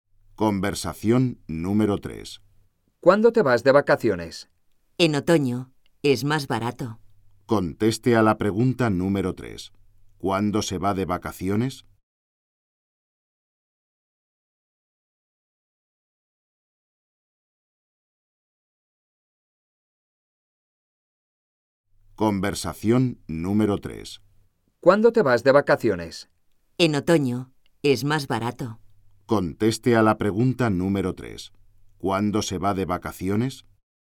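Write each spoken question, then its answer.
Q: ¿Cuándo se va de vacaciones?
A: En otoño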